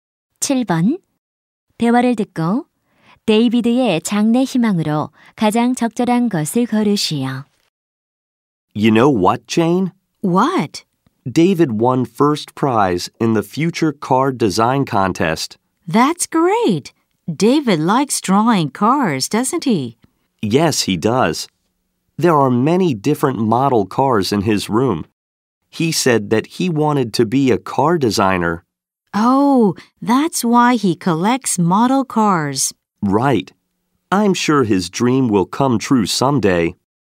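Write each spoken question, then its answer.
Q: 대화를 듣고 데이비드의 장래 희망으로 가장 적절한 것을 고르시오.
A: 자동차 디자이너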